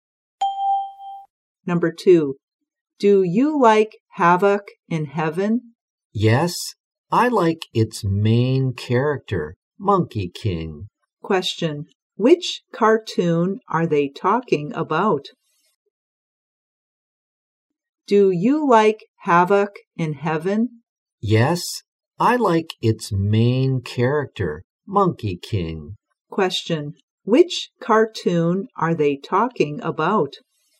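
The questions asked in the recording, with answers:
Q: which cartoon are they talking about?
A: Havoc in Heaven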